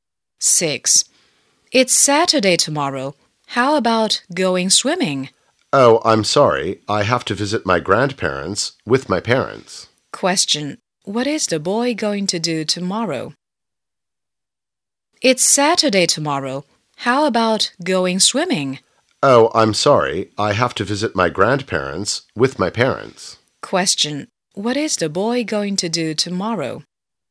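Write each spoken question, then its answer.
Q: What is the boy going to do tomorrow?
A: Visit his grandparents with his parents.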